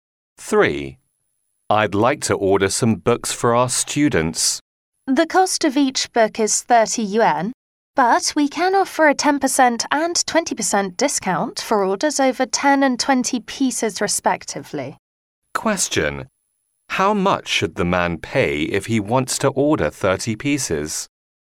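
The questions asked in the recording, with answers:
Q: How much should the man pay if he wants to order 30 pieces?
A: 720 yuan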